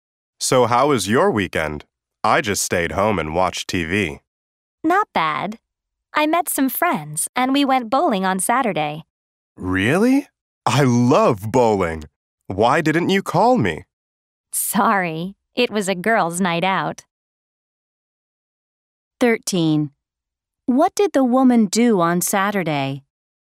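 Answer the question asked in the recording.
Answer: She went bowling with friends.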